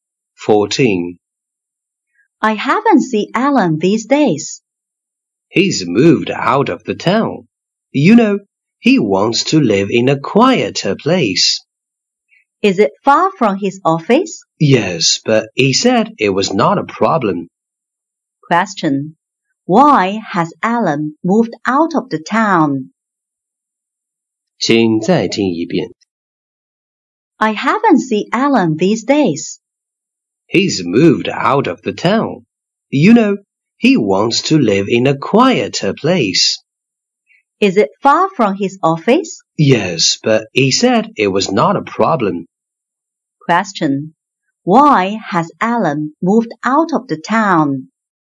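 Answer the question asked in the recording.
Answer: He wants to live in a quieter place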